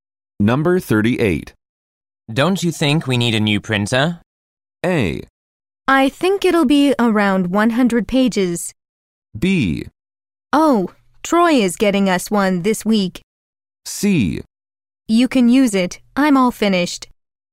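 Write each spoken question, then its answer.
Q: Don't you think we need a new printer?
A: B: Oh, Troy is getting us one this week.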